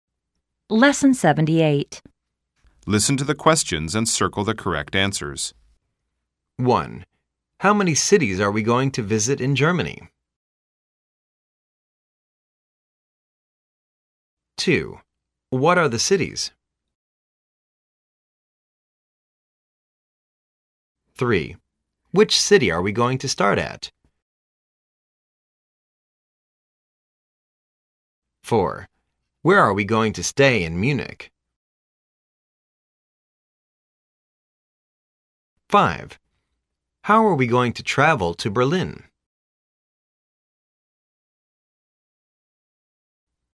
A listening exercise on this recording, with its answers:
Listen to the questions and circle the correct answers.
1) How many cities are we going to visit in Germany?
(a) Above three.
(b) About three.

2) What are the cities?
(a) Hamburg, Munich and Berlin.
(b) France,ltaly, UK.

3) Which city are we going to start at?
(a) The last city is Berlin.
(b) The first city is Hamburg.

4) Where are we going to stay in Munich?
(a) l've booked a B&B near the downtown.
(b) l've booked a taxi to town.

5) How are we going to travel to Berlin?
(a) By cash.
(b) By train.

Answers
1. b
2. a
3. b
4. a
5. b

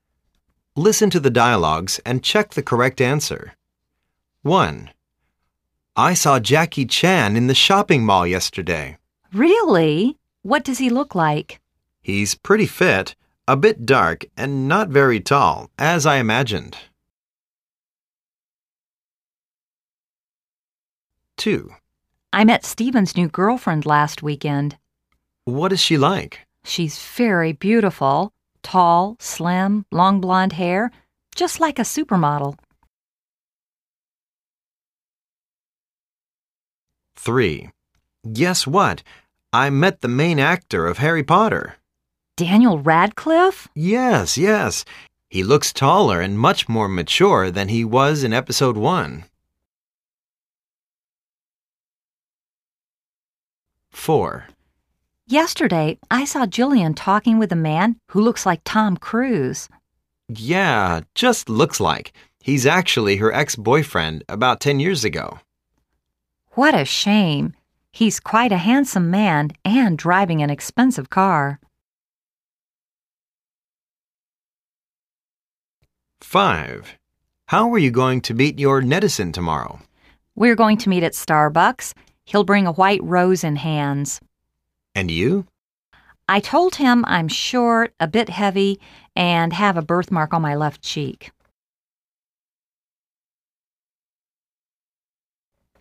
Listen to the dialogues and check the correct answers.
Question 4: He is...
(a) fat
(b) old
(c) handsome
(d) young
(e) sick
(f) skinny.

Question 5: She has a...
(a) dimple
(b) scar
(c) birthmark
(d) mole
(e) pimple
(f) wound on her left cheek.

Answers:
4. c
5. c

